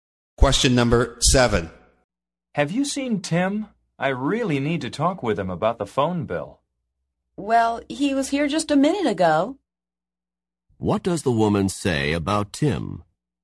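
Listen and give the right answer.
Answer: He was here a minute ago.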